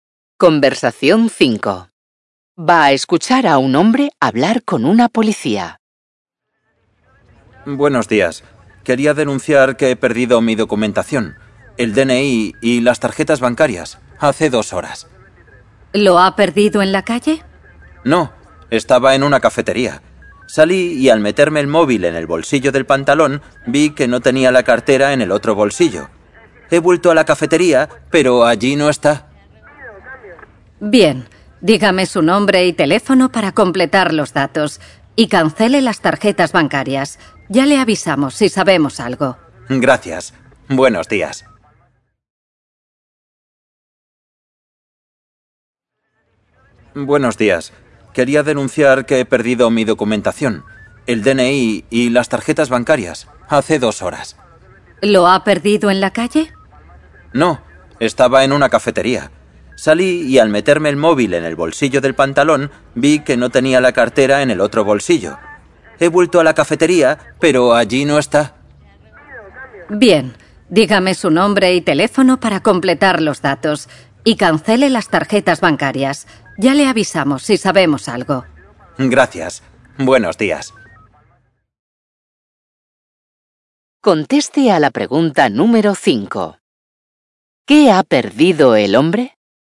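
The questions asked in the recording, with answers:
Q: ¿Qué ha perdido el hombre?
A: La cartera con el DNI y las tarjetas bancarias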